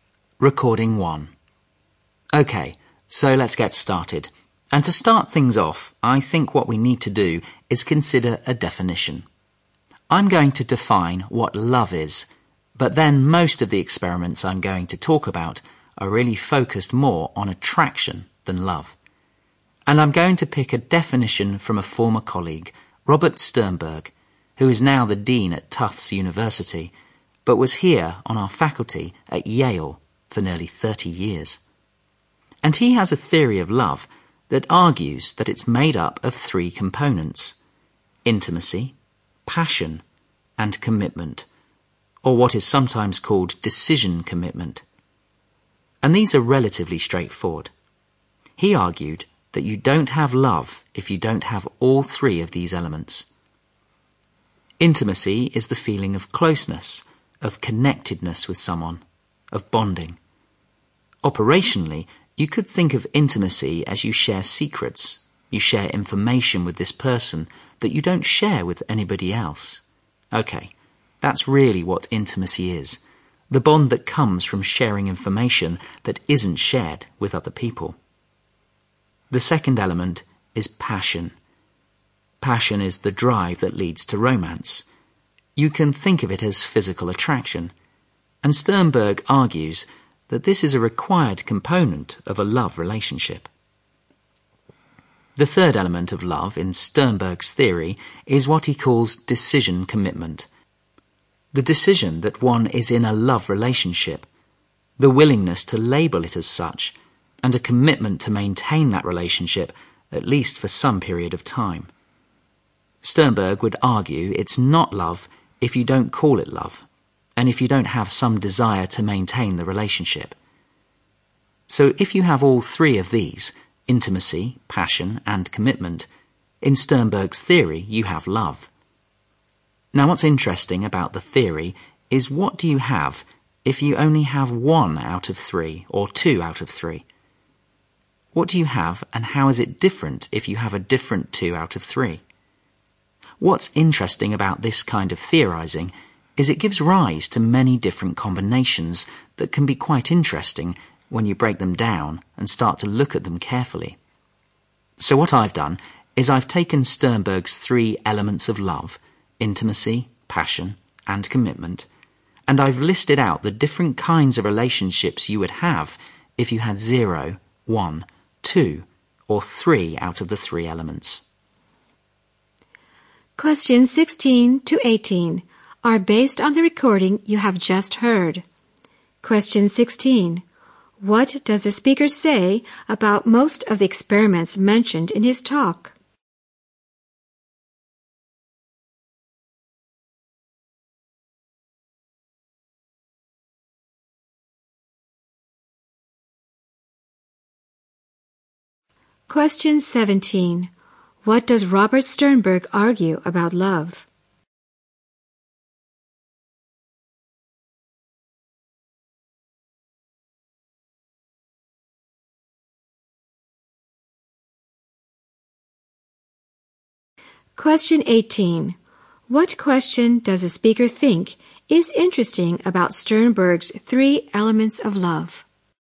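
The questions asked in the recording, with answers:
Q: What does the speaker say about most of the experiments mentioned in his talk?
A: They focus more on attraction than love.

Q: What does Robert Sternberg argue about love?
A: It needs all three: intimacy, passion and commitment.

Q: What question does the speaker think is interesting about Sternberg's 3 elements of love?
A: What you have if you have only one or two of the three elements.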